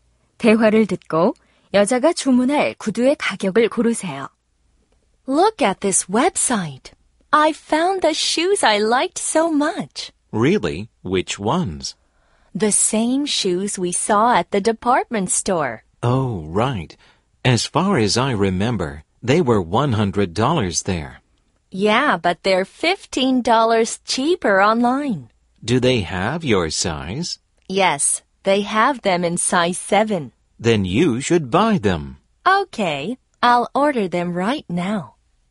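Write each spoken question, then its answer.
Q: 대화를 듣고 여자가 주문할 구두의 가격을 고르세요.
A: 85달러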